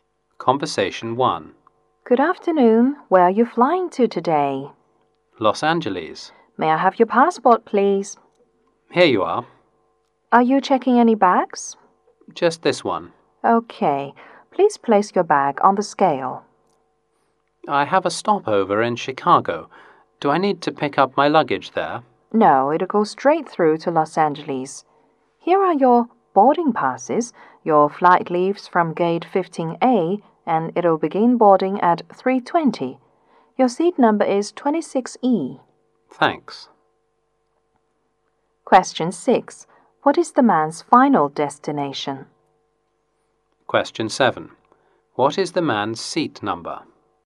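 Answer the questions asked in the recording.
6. Los Angeles
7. 26E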